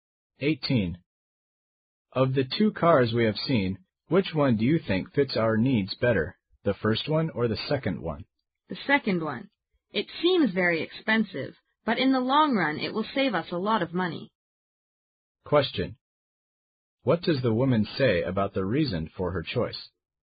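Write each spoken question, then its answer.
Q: What does the woman say about the reason for her choice?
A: The second car will save them money in the long run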